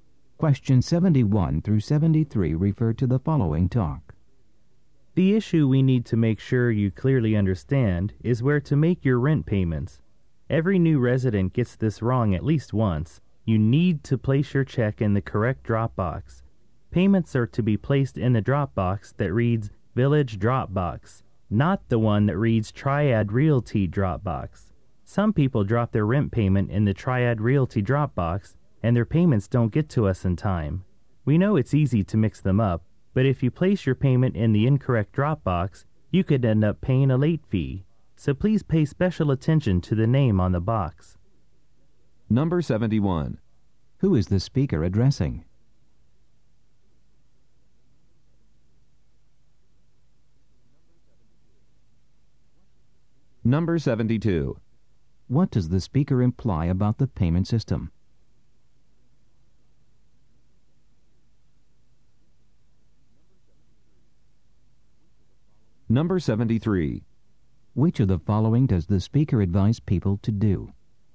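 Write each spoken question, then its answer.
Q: Who is the speaker addressing?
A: New residents

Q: What does the speaker imply about the payment system?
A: The drop boxes are easy to confuse

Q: Which of the following does the speaker advise people to do?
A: Check the name on the drop box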